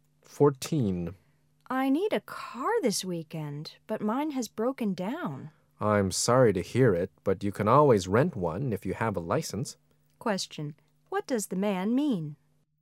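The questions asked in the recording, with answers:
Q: What does the man mean?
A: The woman can rent a car if she has a license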